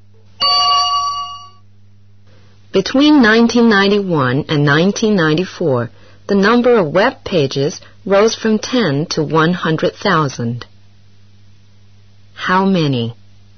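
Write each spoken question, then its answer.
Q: How many?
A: from 10 to 100,000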